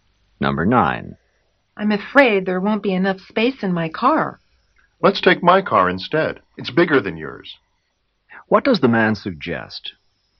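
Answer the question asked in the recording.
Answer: Taking his car, because it is bigger.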